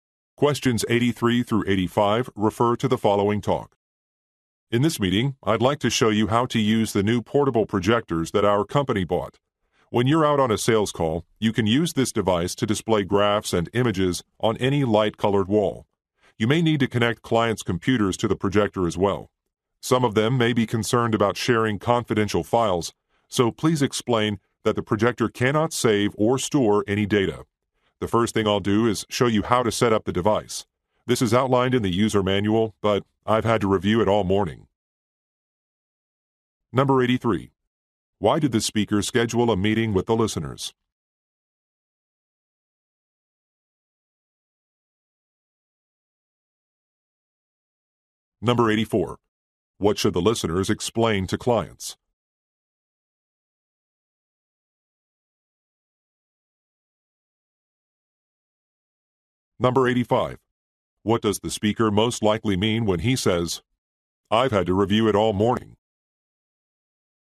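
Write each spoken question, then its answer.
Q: Why did the speaker schedule a meeting with the listeners?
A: To show how to use the new portable projectors

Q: What should the listeners explain to clients?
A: The projector cannot save or store any data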